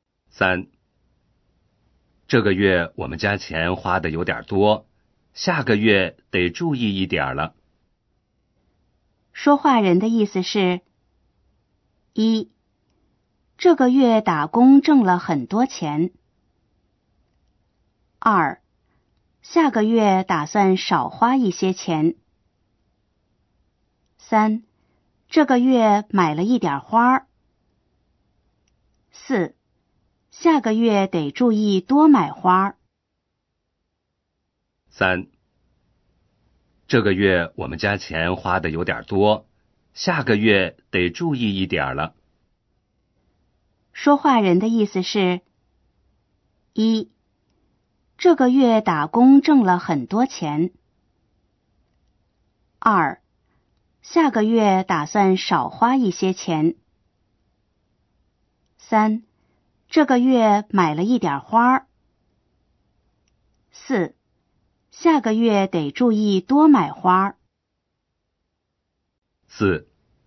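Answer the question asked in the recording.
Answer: 2: 下个月打算少花一些钱。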